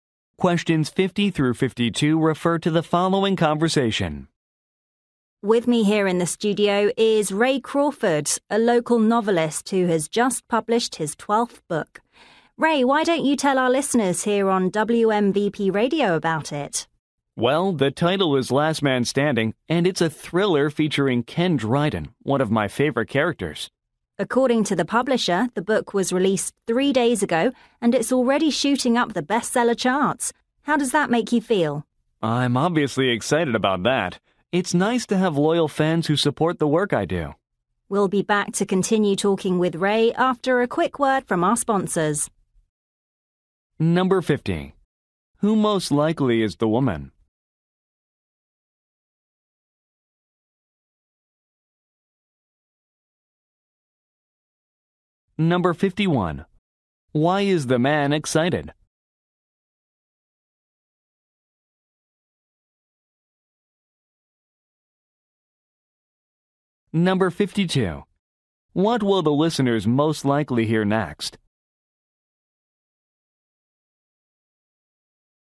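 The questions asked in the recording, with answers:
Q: Who most likely is the woman?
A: A radio host

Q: Why is the man excited?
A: His new book is rising on the bestseller charts

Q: What will the listeners most likely hear next?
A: Advertisements from sponsors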